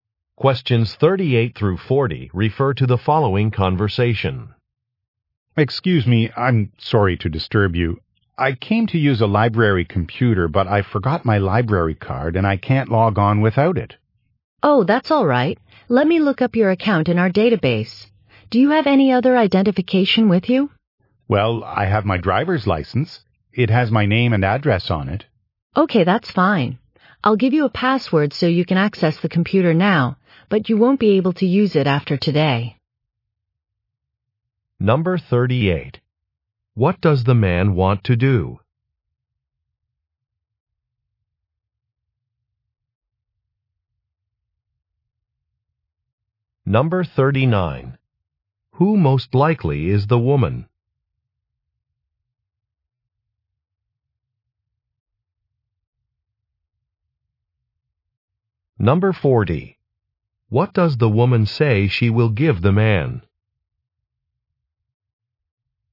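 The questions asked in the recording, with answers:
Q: What does the man want to do?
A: Use a library computer

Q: Who most likely is the woman?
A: A librarian

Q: What does the woman say she will give the man?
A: A password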